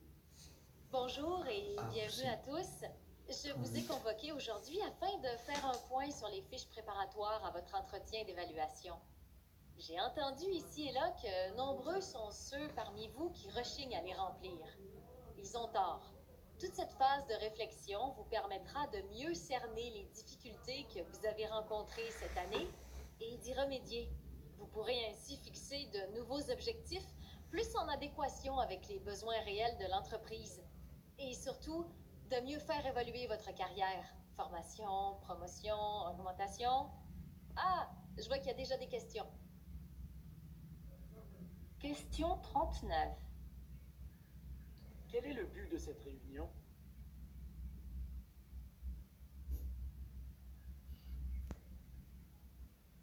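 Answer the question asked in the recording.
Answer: Faire un point sur les fiches préparatoires à l'entretien d'évaluation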